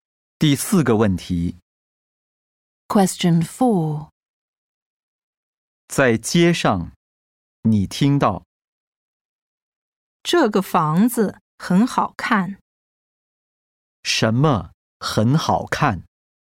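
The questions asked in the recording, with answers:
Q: 什么很好看?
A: 房子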